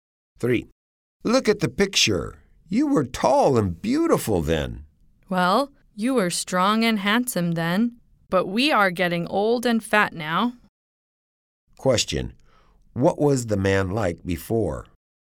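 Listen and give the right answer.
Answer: Strong and handsome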